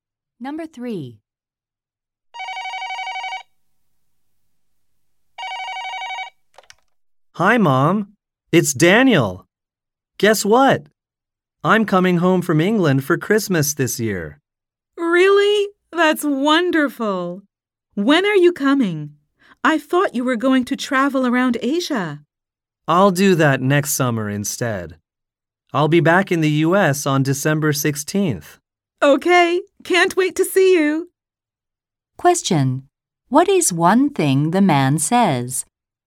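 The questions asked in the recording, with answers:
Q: What is one thing the man says?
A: He is coming home from England for Christmas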